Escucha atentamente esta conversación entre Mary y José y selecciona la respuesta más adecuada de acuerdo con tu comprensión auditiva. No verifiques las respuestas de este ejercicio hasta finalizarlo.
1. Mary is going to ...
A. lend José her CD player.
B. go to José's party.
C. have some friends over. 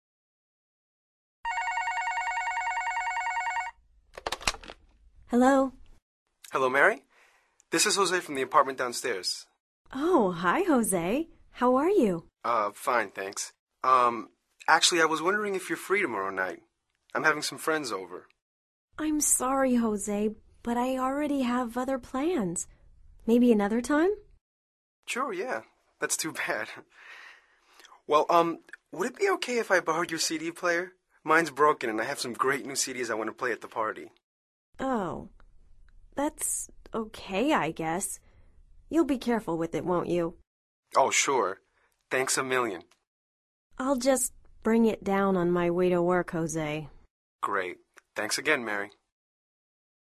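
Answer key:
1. A

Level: Nivel Avanzado

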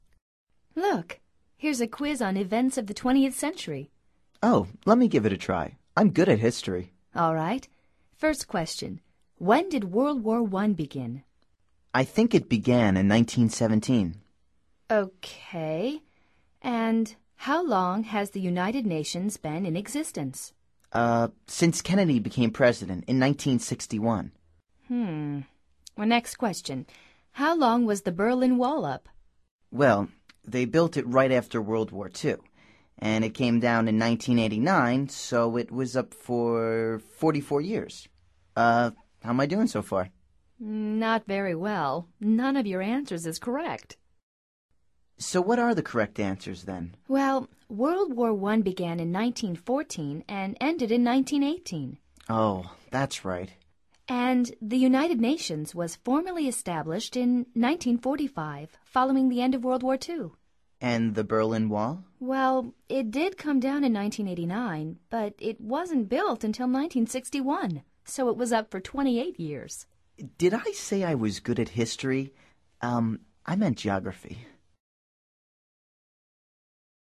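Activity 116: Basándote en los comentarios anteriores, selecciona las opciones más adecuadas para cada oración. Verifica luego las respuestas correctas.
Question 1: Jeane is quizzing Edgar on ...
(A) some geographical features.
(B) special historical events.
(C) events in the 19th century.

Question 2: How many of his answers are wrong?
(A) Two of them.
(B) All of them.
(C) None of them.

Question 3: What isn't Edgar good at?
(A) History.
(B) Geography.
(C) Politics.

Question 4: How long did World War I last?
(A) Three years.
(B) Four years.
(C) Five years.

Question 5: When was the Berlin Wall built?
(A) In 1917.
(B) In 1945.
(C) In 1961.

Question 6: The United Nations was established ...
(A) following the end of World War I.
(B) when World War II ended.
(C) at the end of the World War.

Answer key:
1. B
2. B
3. A
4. B
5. C
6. B

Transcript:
Look. Here's a quiz on events of the twentieth century.
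Oh, let me give it a try. I'm good at history.
All right. First question: When did World War I begin?
I think it began in 1917.
OK. And how long has the United Nations been in existence?
Uh, since Kennedy became president in 1961.
Hmm. Next question: How long was the Berlin Wall up?
Well, they built it right after World War II, and it came down in 1989, so it was up for 44 years. Uh, how am I doing so far?
Not very well. None of your answers is correct!
So what are the correct answers, then?
Well, World War I began in 1914 and ended in 1918.
Oh, that's right.
And the United Nations was formally established in 1945, following the end of World War II.
Well, it did come down in 1989, but it wasn't built until 1961; so it was up for 28 years.
Did I say I was good at history? Um, I meant geography.

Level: Nivel Avanzado

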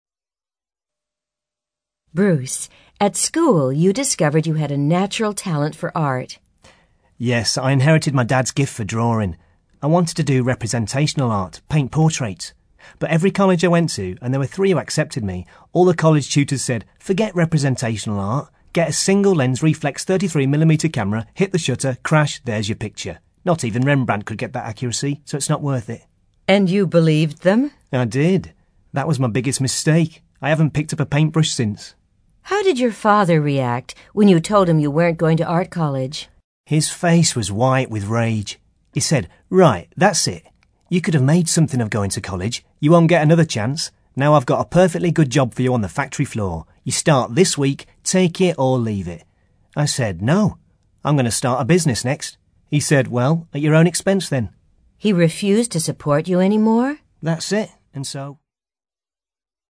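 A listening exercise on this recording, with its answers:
ACTIVITY 42: You are going to listen to part of an interview with Bruce Kellington, a successful businessman who is talking about his early life. Listen carefully and answer the questions below. Then check the audio transcription and the answers.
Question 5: Why did Bruce decide to give up the idea of studying art?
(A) He failed to gain a place at art college.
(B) He became tired of doing representational art.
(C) He was persuaded that he could not realise his ambition.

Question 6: What was his father's reaction to Bruce's decision?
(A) He was anxious to discuss alternative employment options.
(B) He was angry that a good opportunity had been wasted.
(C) He was dismissive of the advantages of higher education.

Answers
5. C
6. B

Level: CAE

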